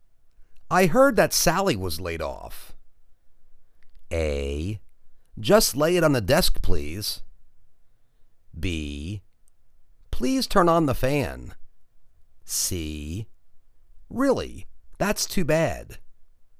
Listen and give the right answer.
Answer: Really? That's too bad.